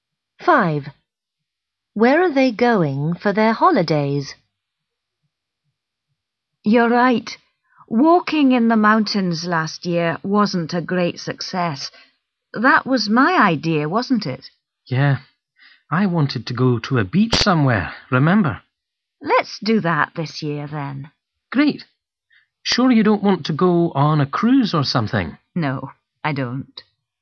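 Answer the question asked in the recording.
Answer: to a beach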